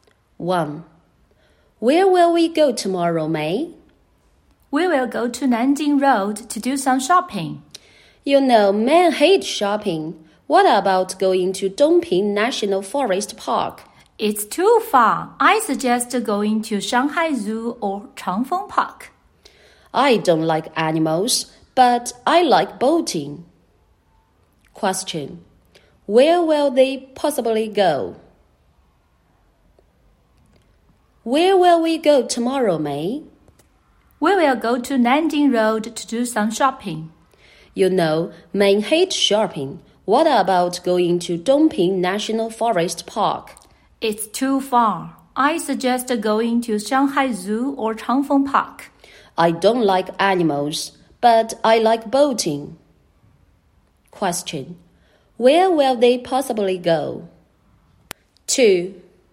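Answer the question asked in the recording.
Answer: Changfeng Park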